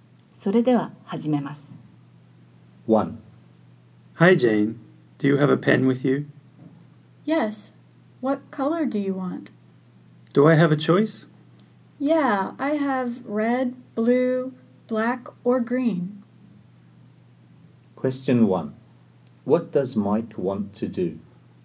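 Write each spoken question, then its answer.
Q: What does Mike want to do?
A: Borrow a pen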